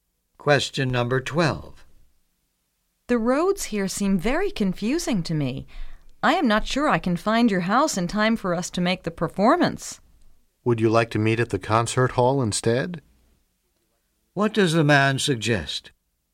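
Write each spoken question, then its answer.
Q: What does the man suggest?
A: Meeting at the concert hall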